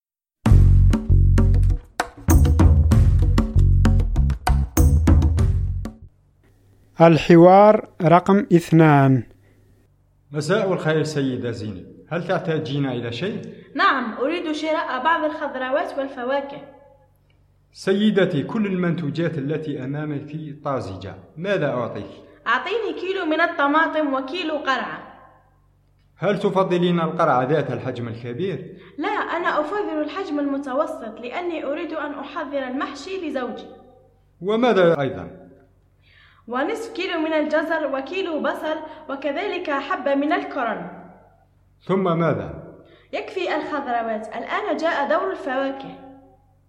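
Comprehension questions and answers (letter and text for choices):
استمع/ استمعي إلى الحوار ثم اختَرْ / اختاري الجواب الصحيح:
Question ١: كلّ منتوجات البائع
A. رائعة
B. حلوة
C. طازجة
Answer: C. طازجة

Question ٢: السيّدة زينب تفضّل القرعة ذات الحجم المتوسط لأنها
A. تريد أن تنظم حفلة عيد ميلادها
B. تريد أن تحضّر المحشي لزوجها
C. تريد أن تطبخ اللحم المشوي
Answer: B. تريد أن تحضّر المحشي لزوجها

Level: المستوى الأول الدرجة الثانية (A2)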